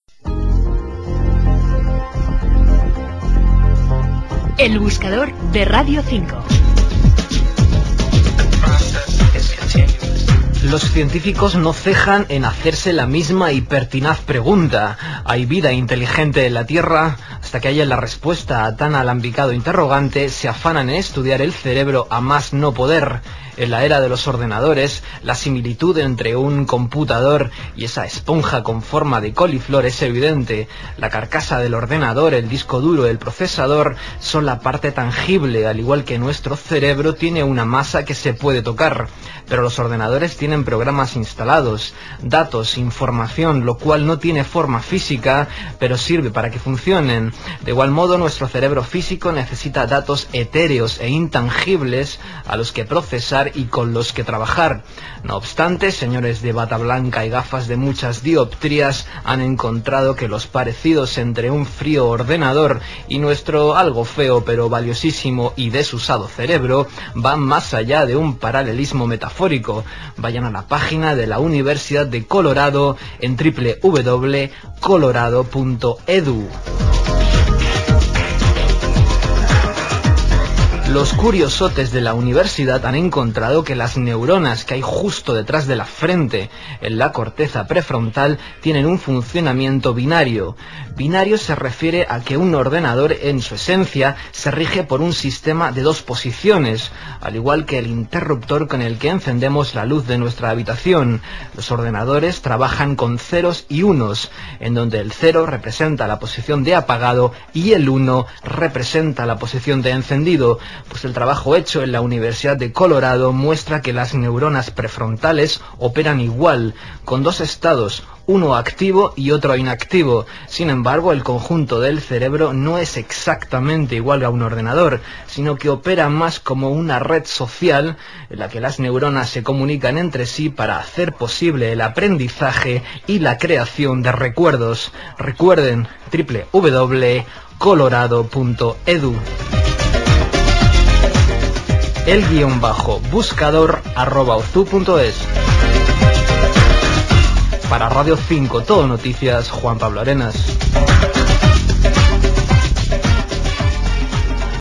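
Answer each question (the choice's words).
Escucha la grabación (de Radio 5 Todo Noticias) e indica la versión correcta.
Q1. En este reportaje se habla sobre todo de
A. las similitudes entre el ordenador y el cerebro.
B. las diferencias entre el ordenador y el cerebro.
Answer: las similitudes entre el ordenador y el cerebro.

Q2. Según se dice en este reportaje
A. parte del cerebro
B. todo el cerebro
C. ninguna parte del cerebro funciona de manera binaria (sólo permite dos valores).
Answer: parte del cerebro

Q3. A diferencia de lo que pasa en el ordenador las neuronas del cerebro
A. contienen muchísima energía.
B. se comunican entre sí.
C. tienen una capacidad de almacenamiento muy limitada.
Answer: se comunican entre sí.

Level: 中级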